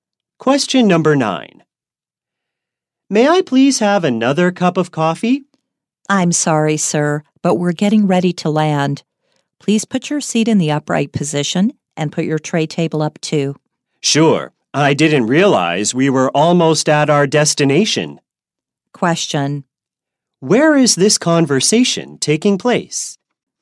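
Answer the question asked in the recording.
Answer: On an airplane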